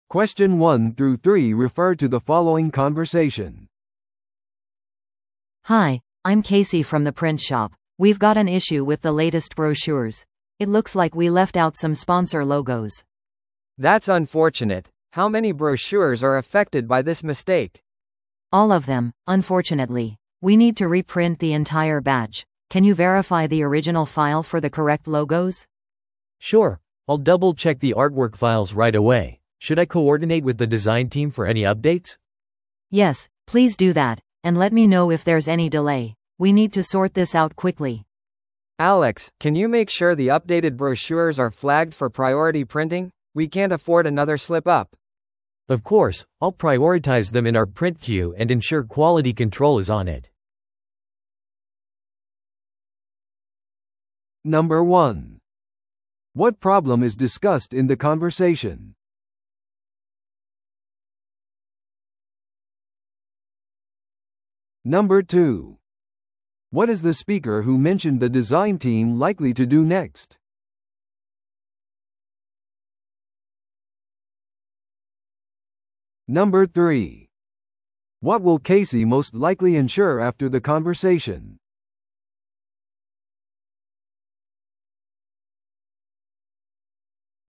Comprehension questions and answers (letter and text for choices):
Listen to the audio below and answer the questions.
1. What problem is discussed in the conversation?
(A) パンフレットの配送に遅れがあります。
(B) 重要なファイルがアーカイブから欠落しています。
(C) スポンサーロゴがパンフレットから抜かれていました。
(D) パンフレットのオリジナルアートワークが間違っていました。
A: (C) スポンサーロゴがパンフレットから抜かれていました。

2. What is the speaker who mentioned the design team likely to do next?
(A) 正しいロゴを得るためにスポンサーに連絡する。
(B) アップデートのためにデザインチームと調整する。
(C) イベント会場にパンフレットを届ける。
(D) 印刷スケジュールについて話し合う会議を組織する。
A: (B) アップデートのためにデザインチームと調整する。

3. What will Casey most likely ensure after the conversation?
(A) プリントショップの紙の在庫をチェックする。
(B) 将来のパンフレットのために新しいデザインチームを採用する。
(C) 品質を監視しながら再印刷プロセスを確認する。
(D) エラーについてスポンサーに謝罪するために連絡する。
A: (C) 品質を監視しながら再印刷プロセスを確認する。

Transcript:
A: Hi, I'm Casey from the print shop. We've got an issue with the latest brochures; it looks like we left out some sponsor logos.
B: That's unfortunate. How many brochures are affected by this mistake?
A: All of them, unfortunately. We need to reprint the entire batch. Can you verify the original file for the correct logos?
C: Sure, I'll double-check the artwork files right away. Should I coordinate with the design team for any updates?
A: Yes, please do that, and let me know if there's any delay. We need to sort this out quickly.
B: Alex, can you make sure the updated brochures are flagged for priority printing? We can't afford another slip-up.
C: Of course, I'll prioritize them in our print queue and ensure quality control is on it.